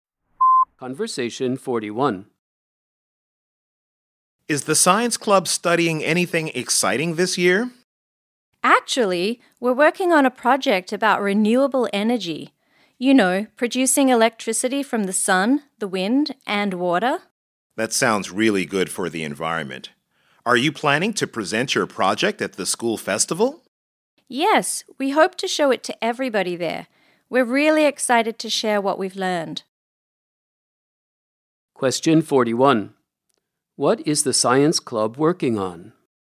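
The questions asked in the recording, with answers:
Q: What is the science club working on?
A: A project about renewable energy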